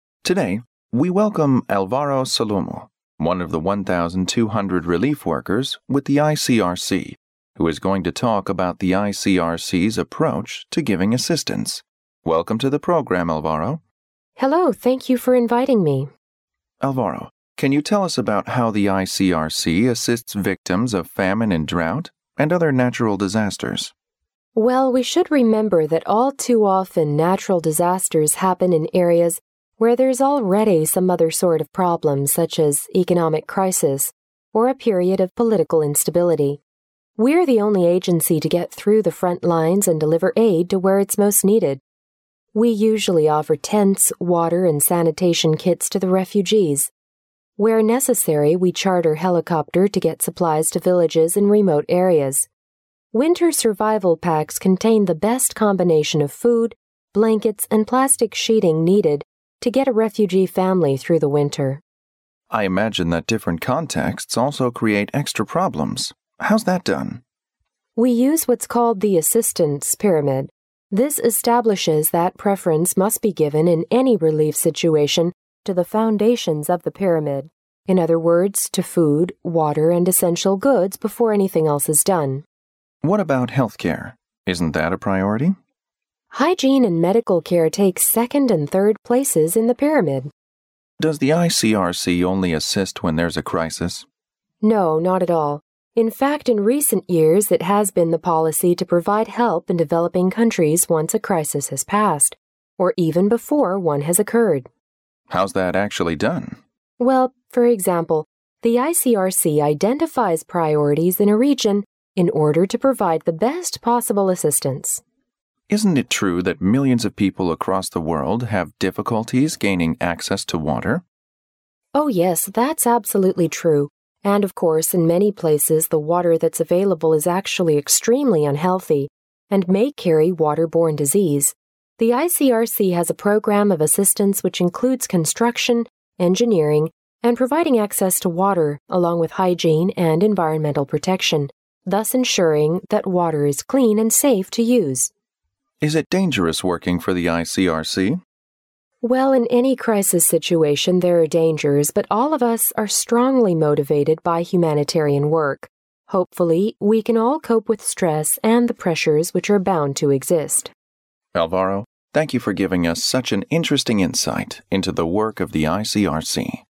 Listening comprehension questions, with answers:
Directions:Each conversation will be read only once. At the end of each conversation, there will be a one-minute pause. During the pause, read the four choices marked A, B, C and D, and decide which is the best answer or complete the following sentences with one word according to what you hear.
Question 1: The woman in this conversation is a _____ worker.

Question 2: The principle of "Assistance Pyramid" means that _____ goods must be top priority on all occasions.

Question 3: The ICRC identified priorities in a region to provide the best possible _____.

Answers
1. relief
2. essential
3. assistance

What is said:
M: Today we welcome Alvaro Solomou, one of the 1,200 relief workers with the ICRC, who is going to talk about the ICRCS approach to giving assistance. Welcome to the programme, Alvaro.
W: Hello, thank you for inviting me.
M: Alvaro, can you tell us about how the ICRC assists victims of famine and drought, and other natural disasters?
W: Well, we should remember that all too often natural disasters happen in areas where there's already some other sort of problems, such as economic crisis, or a period of political instability. We're the only agency to get through the front lines and deliver aid to where it's most needed. We usually offer tents, water, and sanitation kits to the refugees. Where necessary, we charter helicopter to get supplies to villages in remote areas. Winter survival packs contain the best combination of food, blankets and plastic sheeting needed to get a refugee family through the winter.
M: I imagine that different contexts also create extra problems, how's that done?
W: We use what's called the 'Assistance Pyramid'. This establishes that preference must be given in any relief situation to the foundations of the pyramid, in other words, to food, water, and essential goods, before anything else is done.
M: What about health care? Isn't that a priority?
W: Hygiene and medical care take second and third places in the pyramid.
M: Does the ICRC only assist when there's a crisis?
W: No, not at all. In fact, in recent years it has been the policy to provide help in developing countries once a crisis has passed, or even before one has occurred.
M: How's that actually done?
W: Well, for example, the ICRC identifies priorities in a region in order to provide the best possible assistance.
M: Isn't it true that millions of people across the world have difficulties gaining access to water?
W: Oh yes, that's absolutely true, and of course in many places the water that's available is actually extremely unhealthy, and may carry waterborne disease. The ICRC has a programme of assistance which includes construction, engineering and providing access to water, along with hygiene and environmental protection, thus ensuring that water is clean and safe to use.
M: Is it dangerous working for the ICRC?
W: Well, in any crisis situation there're dangers, but all of us are strongly motivated by humanitarian work, hopefully we can all cope with stress and the pressures which are bound to exist.
M: Alvaro, thank you for giving us such an interesting insight into the work of the ICRC.